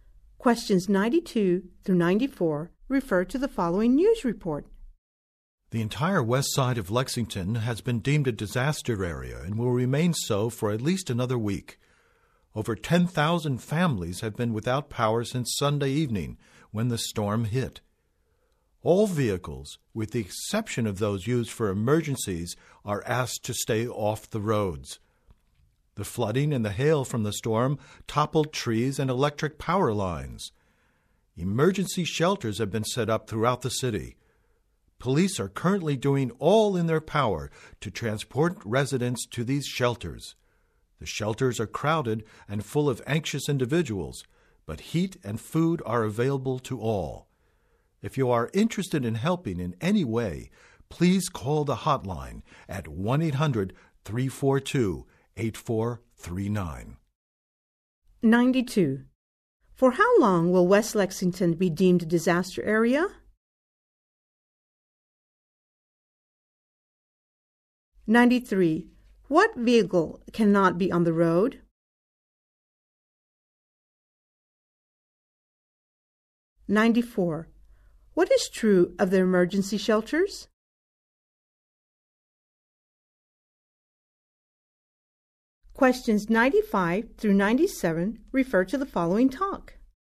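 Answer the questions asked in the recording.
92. At least another week
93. Any non-emergency vehicle
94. They are crowded but have heat and food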